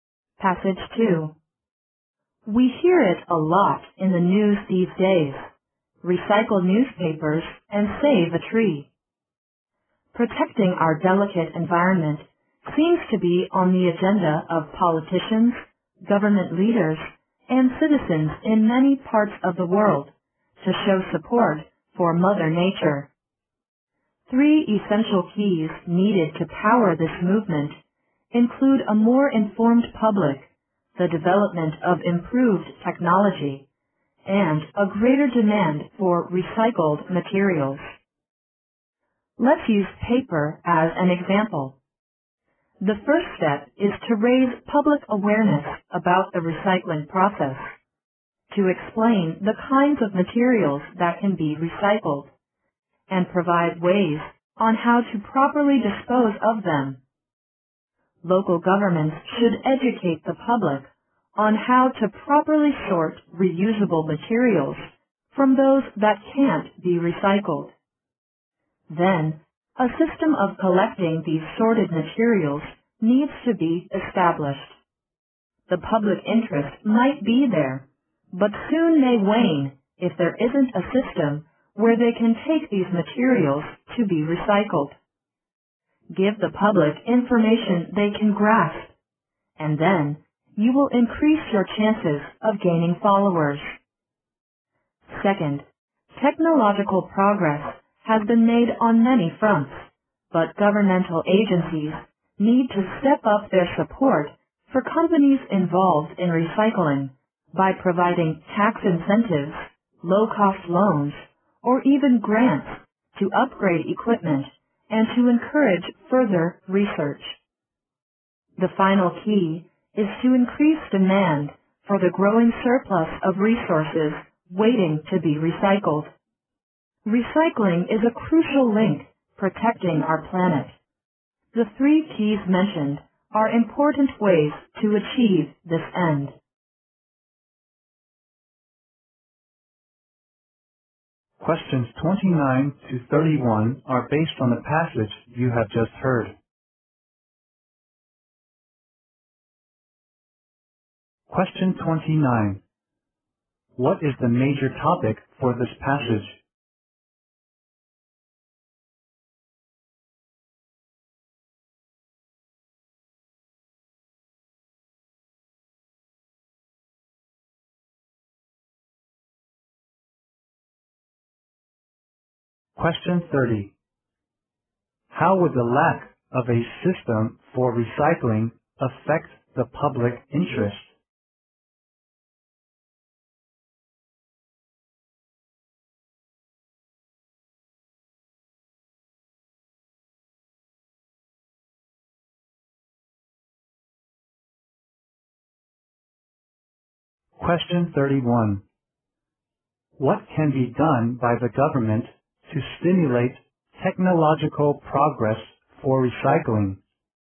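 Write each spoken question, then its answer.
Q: What is the major topic for this passage?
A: Three keys to promoting recycling.

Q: How would the lack of a system for recycling affect the public interest?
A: Public interest might soon wane.

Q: What can be done by the government to stimulate technological progress for recycling?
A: Provide tax incentives, low-cost loans or grants to recycling companies.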